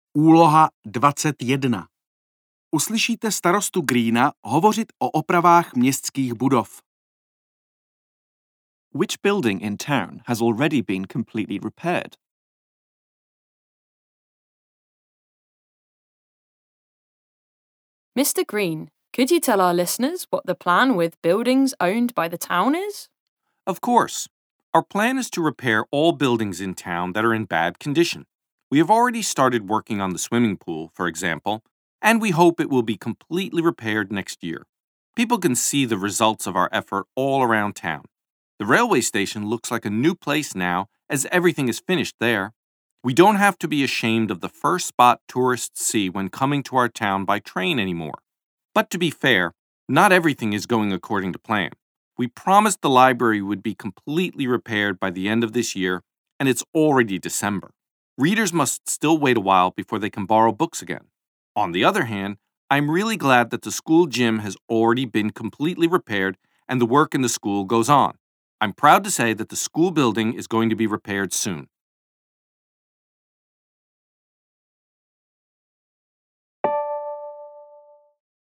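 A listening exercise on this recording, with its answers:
Uslyšíte čtyři krátké nahrávky. Nejprve uslyšíte otázku a poté vyslechnete nahrávku. Na základě vyslechnutých nahrávek vyberte k úlohám 21–24 vždy jednu správnou odpověď A–D.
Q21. Which building in town has already been completely repaired?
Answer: the railway station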